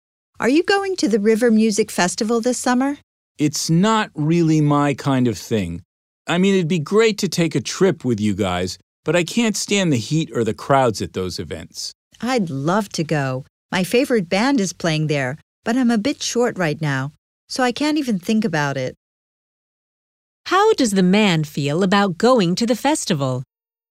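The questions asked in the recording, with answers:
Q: How does the man feel about going to the festival?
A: He'd love to go but can't afford it right now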